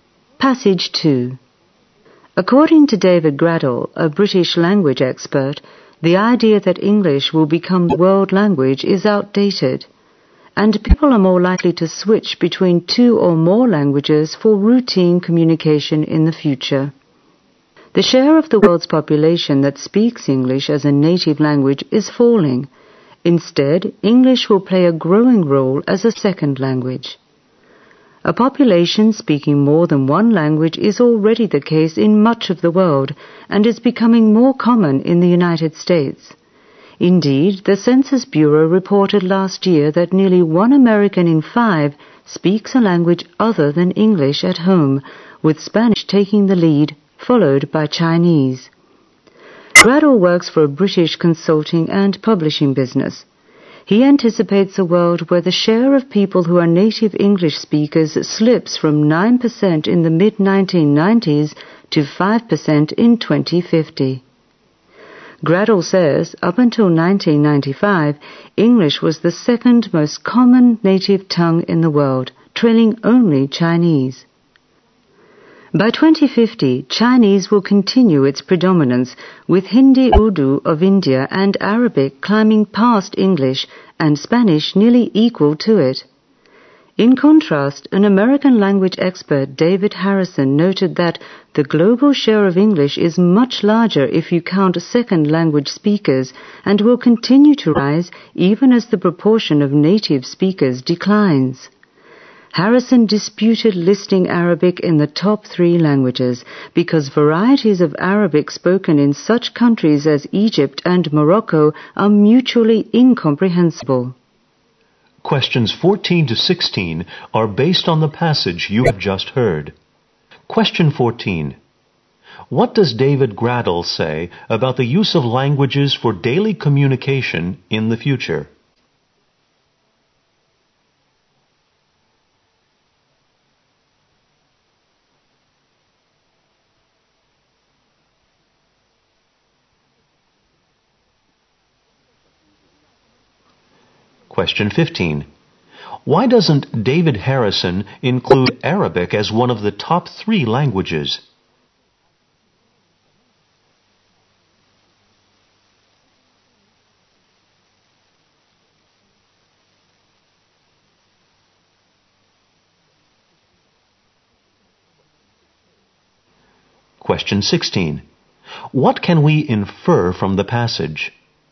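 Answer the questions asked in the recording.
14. People will switch between two or more languages
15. Its varieties are mutually incomprehensible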